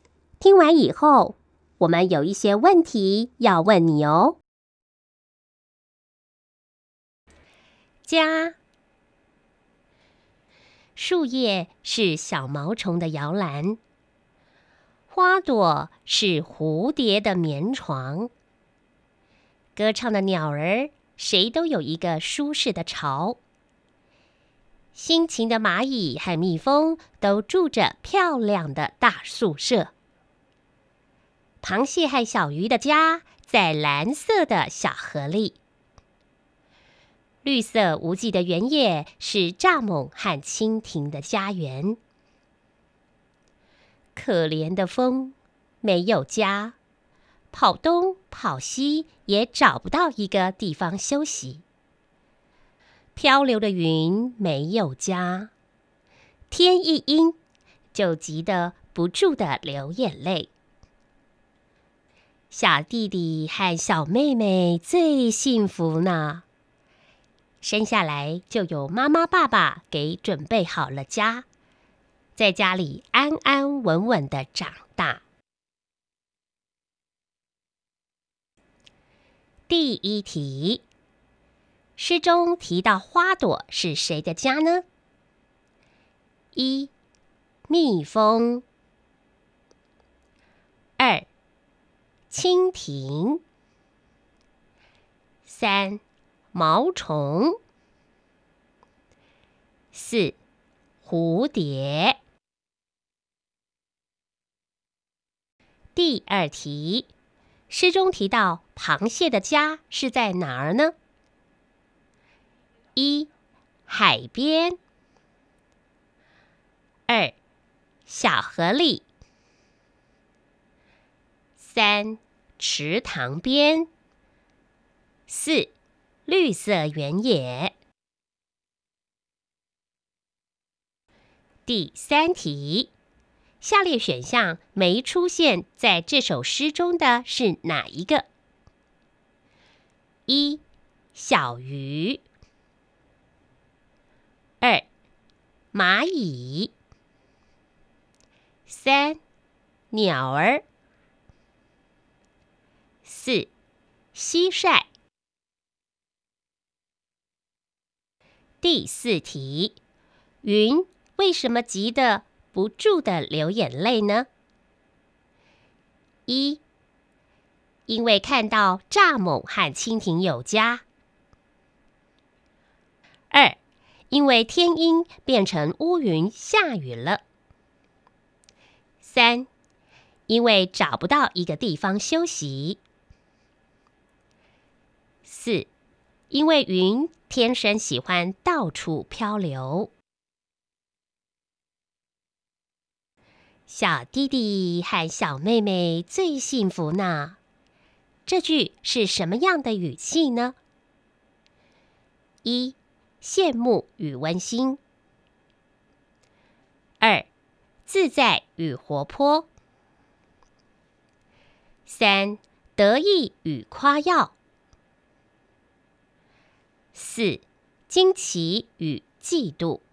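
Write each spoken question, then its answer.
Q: 诗中提到花朵是谁的家呢?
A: 四: 蝴蝶

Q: 诗中提到螃蟹的家是在哪儿呢?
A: 二: 小河里

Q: 下列选项没出现在这首诗中的是哪一个?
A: 四: 蟋蟀

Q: 小弟弟和小妹妹最幸福呢,这句是什么样的语气呢?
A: 一: 羡慕与温馨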